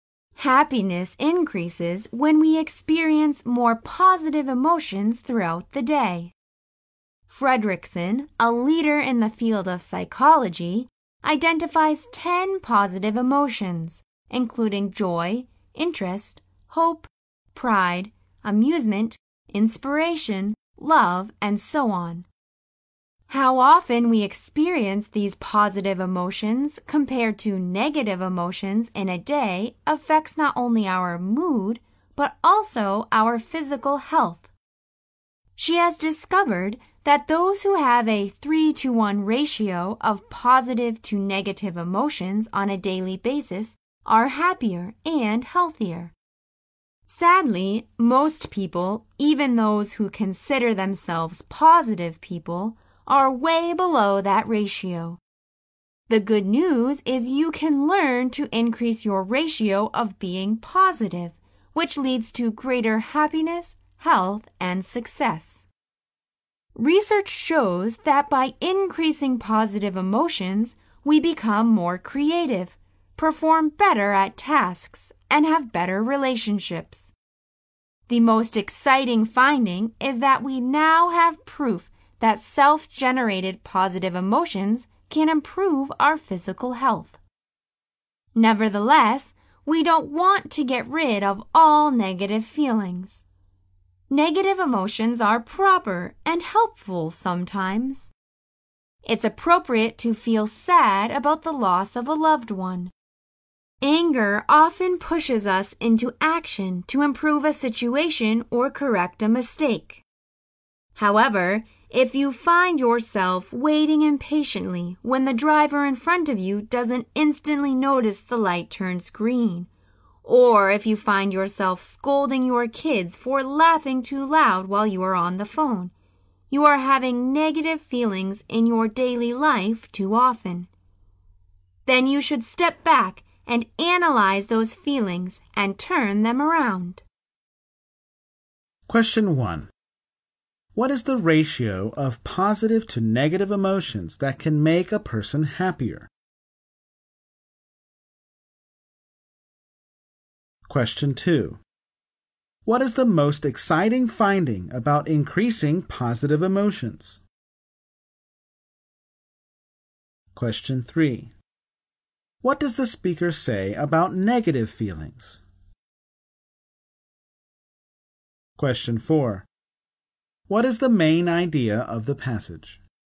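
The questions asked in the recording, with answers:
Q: What is the ratio of positive to negative emotions that can make a person happier?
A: 3 to 1

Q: What is the most exciting finding about increasing positive emotions?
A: Self-generated positive emotions can improve physical health

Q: What does the speaker say about negative feelings?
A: They are proper and helpful sometimes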